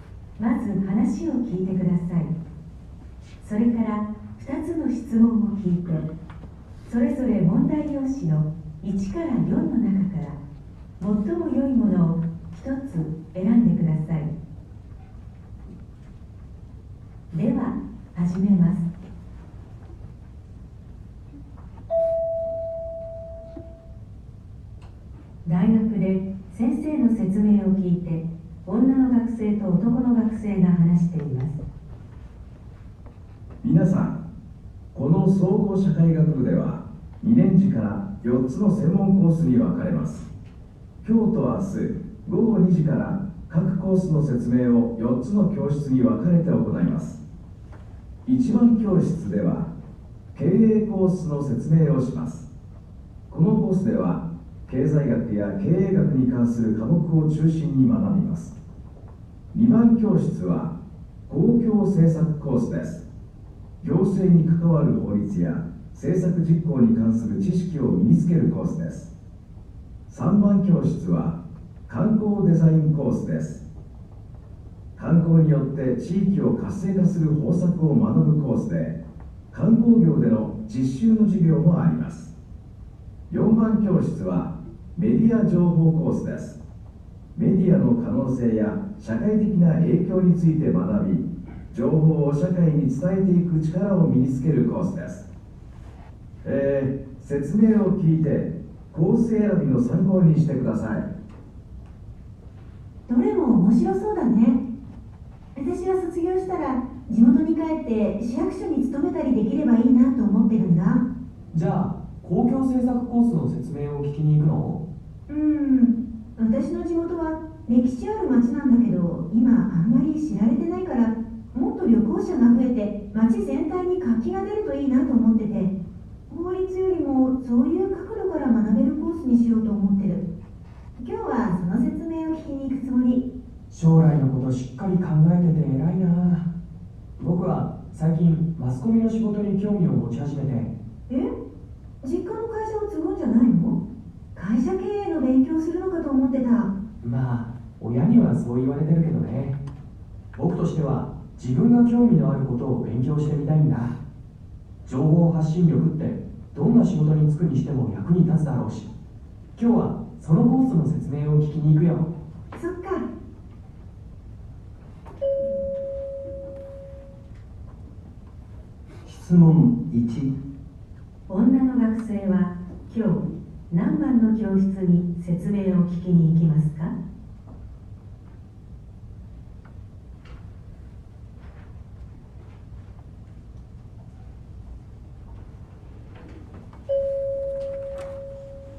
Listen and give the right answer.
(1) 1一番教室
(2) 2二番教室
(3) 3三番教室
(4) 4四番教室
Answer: (3) 3三番教室

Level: N1 Listening · Test 2